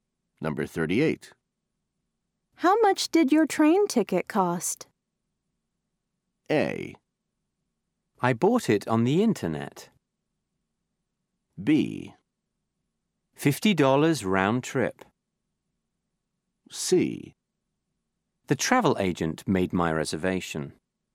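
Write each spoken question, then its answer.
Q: How much did your train ticket cost?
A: B: $50 round trip.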